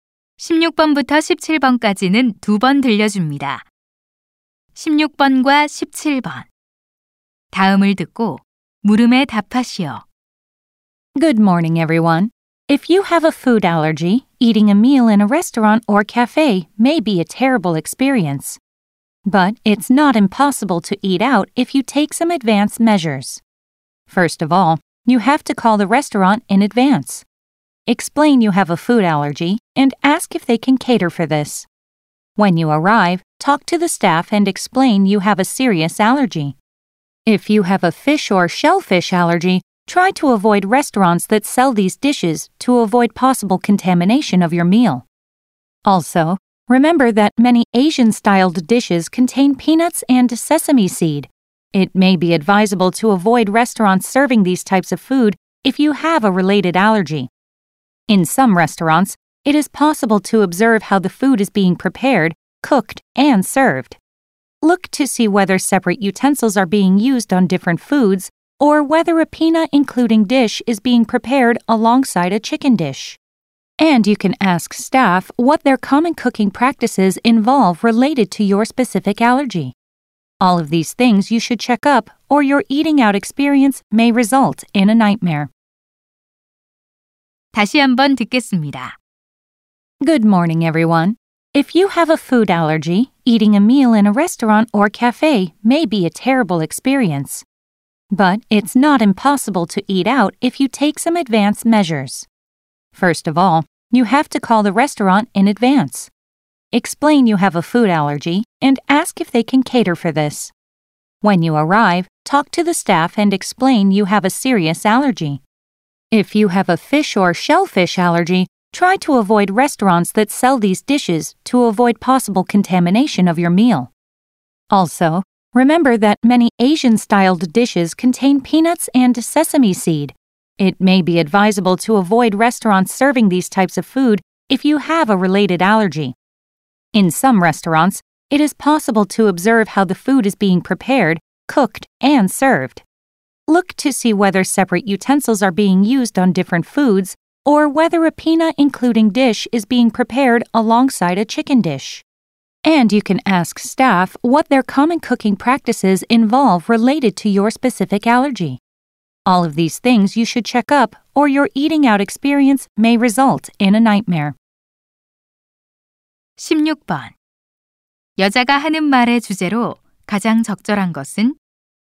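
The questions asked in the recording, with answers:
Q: 여자가 하는 말의 주제로 가장 적절한 것은?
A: 음식 알레르기가 있는 사람이 안전하게 외식하는 방법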